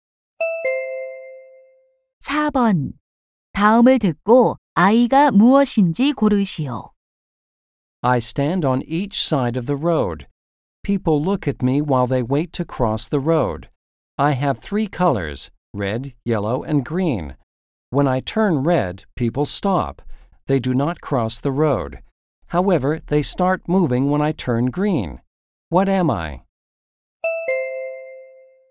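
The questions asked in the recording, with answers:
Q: What am I?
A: traffic light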